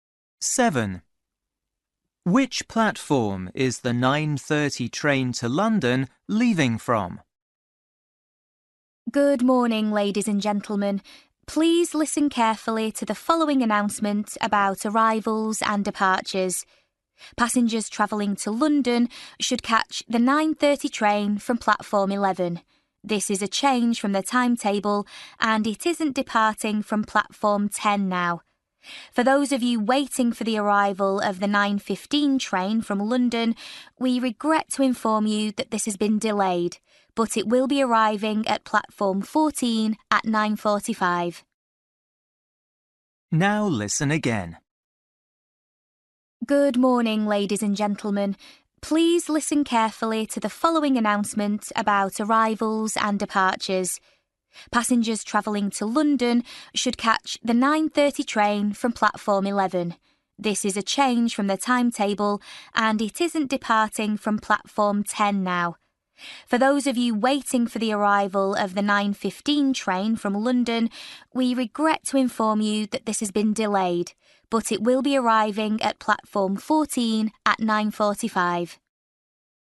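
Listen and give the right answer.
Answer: Platform 11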